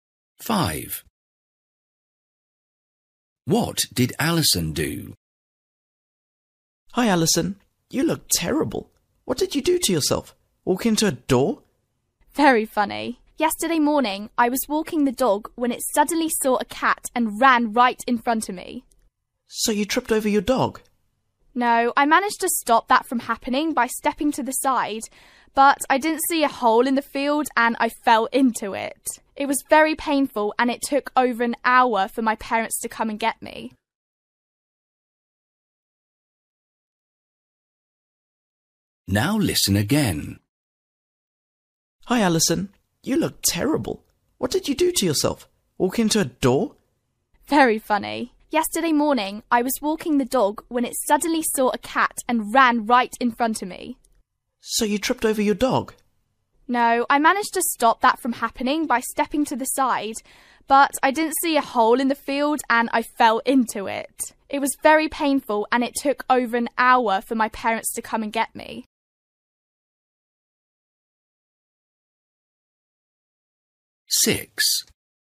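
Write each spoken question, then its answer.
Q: What did Alison do?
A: She fell into a hole in a field while walking the dog.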